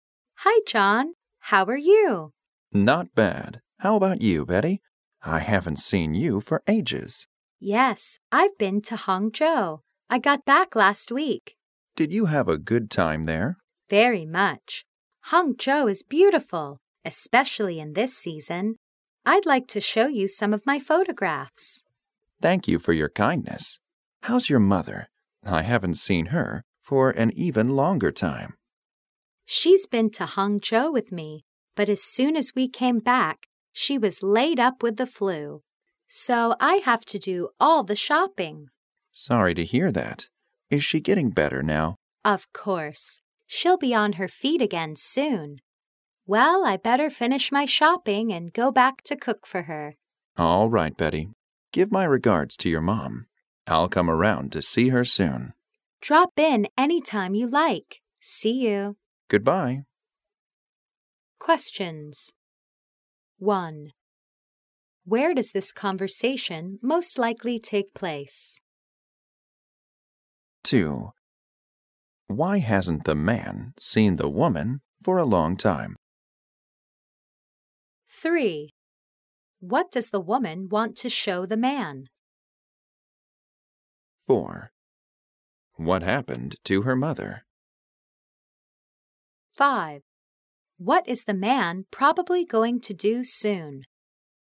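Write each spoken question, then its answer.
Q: Why hasn't the man seen the woman for a long time?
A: She has been to Hangzhou

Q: What does the woman want to show the man?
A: Some of her photographs

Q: What happened to her mother?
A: She was ill with the flu

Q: What is the man probably going to do soon?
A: Go to see Betty's mother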